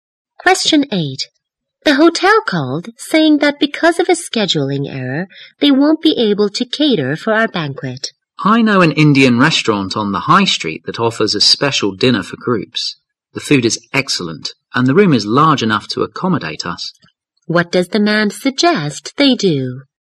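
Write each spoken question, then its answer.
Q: What does the man suggest they do?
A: Hold the banquet at an Indian restaurant on the high street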